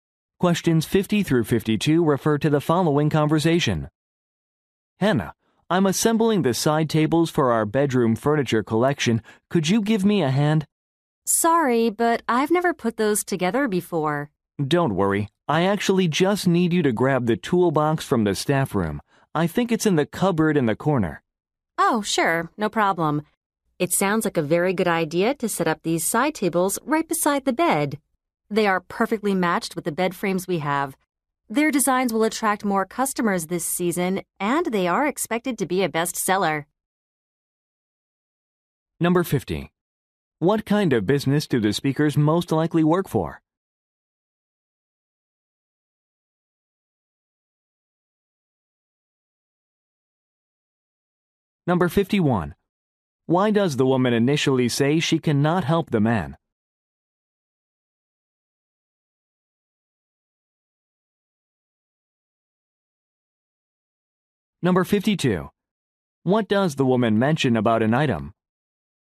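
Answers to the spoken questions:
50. A furniture company
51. She has never assembled those tables before
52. It is expected to be a bestseller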